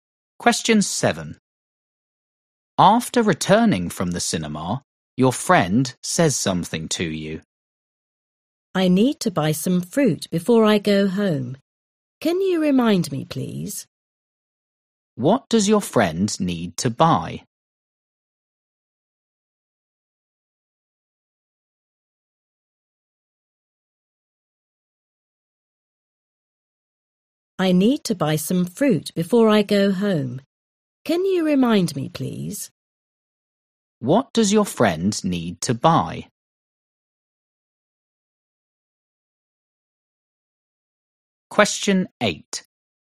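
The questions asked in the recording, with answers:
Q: What does your friend need to buy?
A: Some fruit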